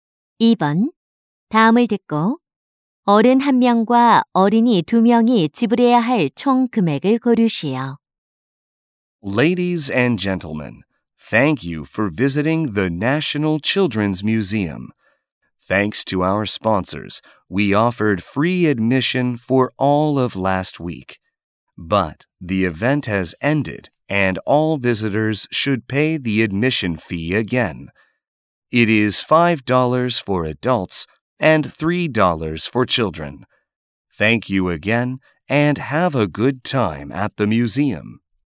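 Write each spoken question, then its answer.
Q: 다음을 듣고 어른 한 명과 어린이 두 명이 지불해야 할 총 금액을 고르시오.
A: 11달러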